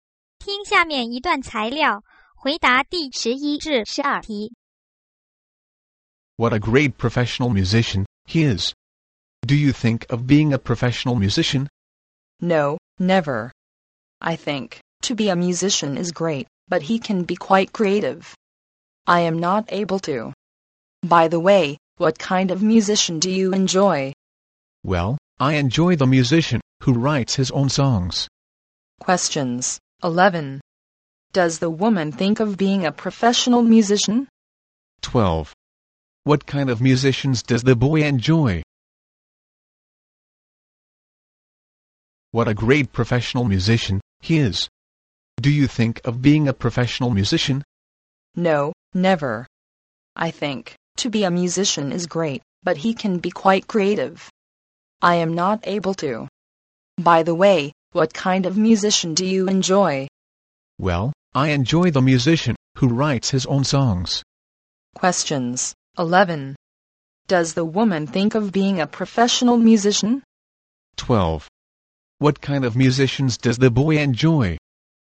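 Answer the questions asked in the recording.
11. No, never
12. Musicians who write their own songs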